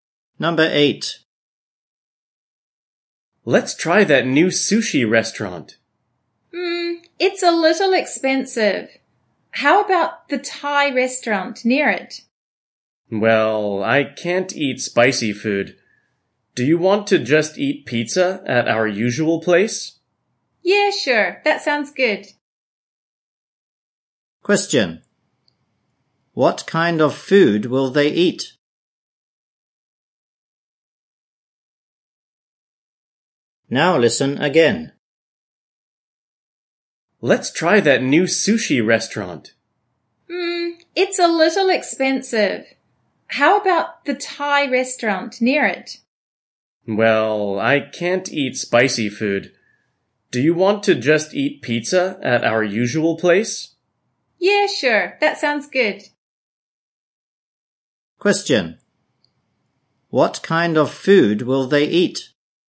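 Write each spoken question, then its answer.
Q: What kind of food will they eat?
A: Pizza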